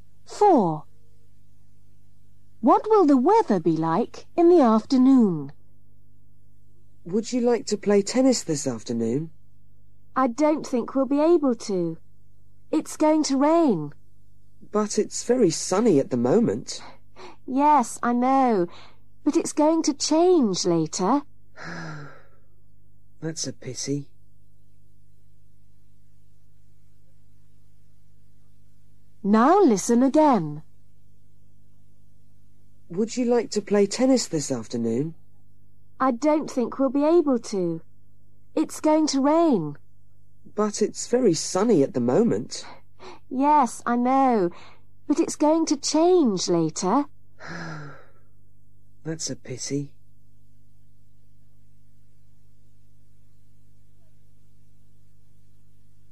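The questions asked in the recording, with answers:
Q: What will the weather be like in the afternoon?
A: rainy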